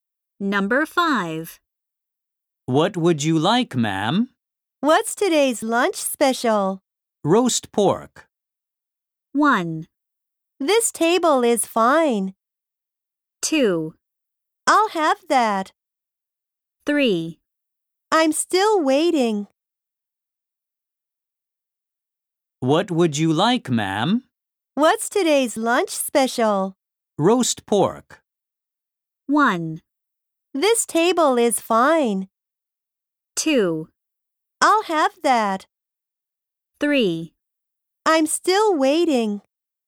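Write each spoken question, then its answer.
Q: Roast pork.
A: 2: I'll have that.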